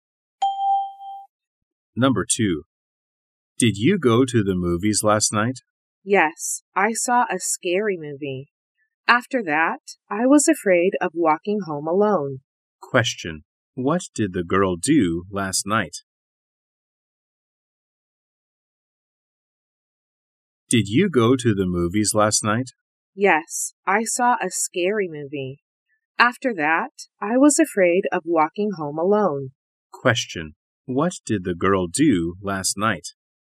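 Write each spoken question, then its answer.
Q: What did the girl do last night?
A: She saw a scary movie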